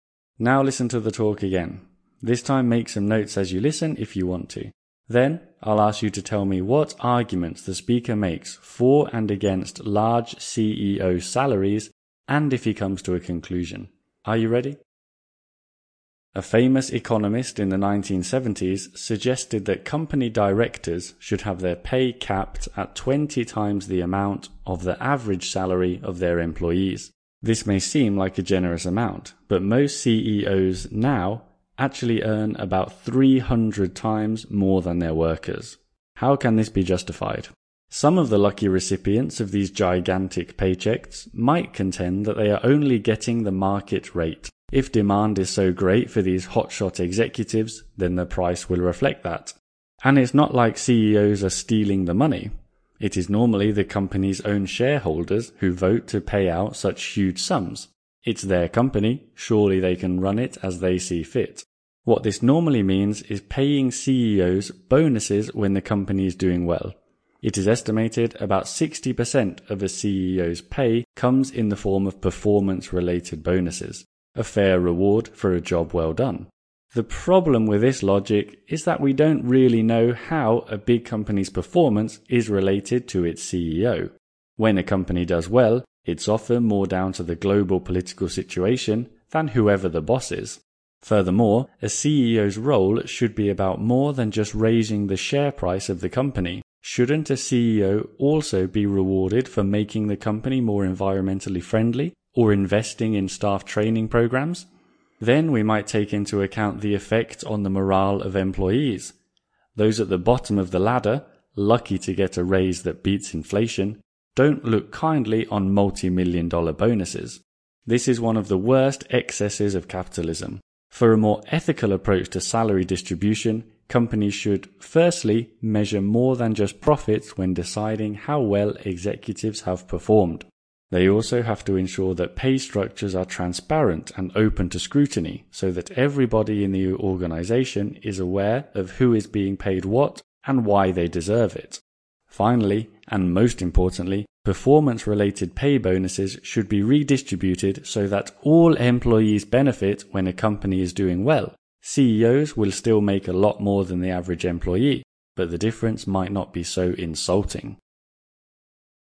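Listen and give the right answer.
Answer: For: CEOs get the market rate, shareholders vote for the pay, and bonuses reward good performance. Against: a company's success often depends more on the global political situation than on the CEO, CEOs should be rewarded for more than the share price, and huge bonuses hurt staff morale. Conclusion: measure more than profits, make pay transparent, and share performance bonuses with all employees.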